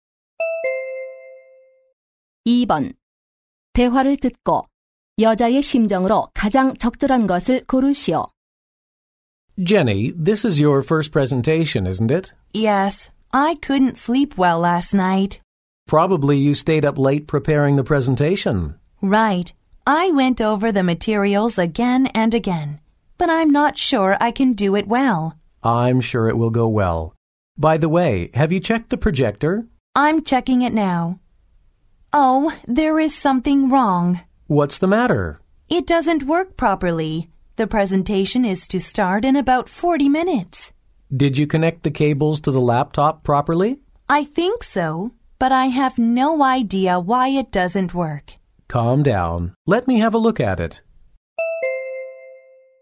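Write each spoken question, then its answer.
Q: 대화를 듣고 여자의 심정으로 가장 적절한 것을 고르시오.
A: 초조하고 불안함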